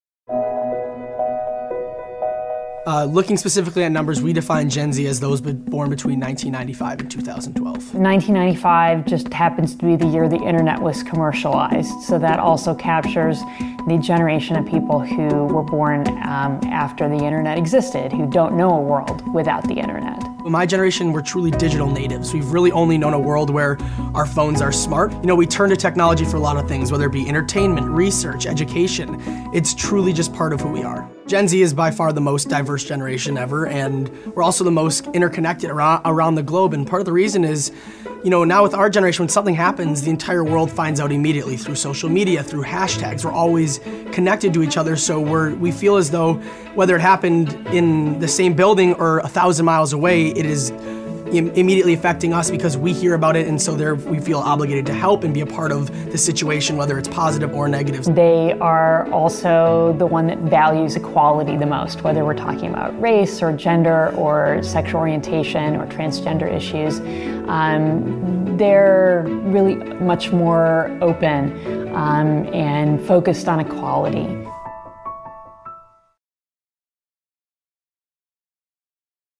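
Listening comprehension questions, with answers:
Listen to the audio and answer the questions.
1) What is Gen Z?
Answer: Those born between 1995 and 2012, after the internet was commercialized.

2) What are Gen Z's defining traits?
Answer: Digital natives, the most diverse and interconnected generation, and the one that values equality the most.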